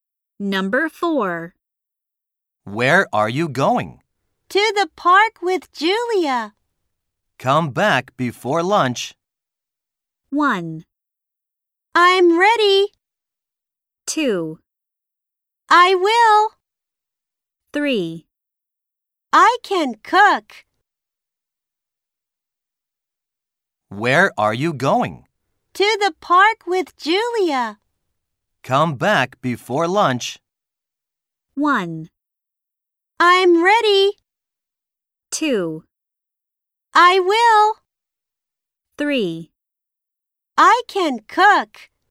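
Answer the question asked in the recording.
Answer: 2: I will.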